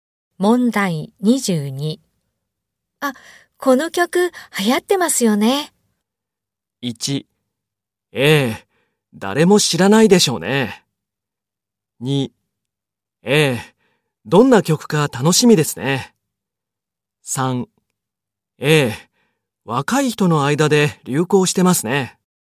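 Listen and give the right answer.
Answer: 3: ええ、若い人の間で流行してますね。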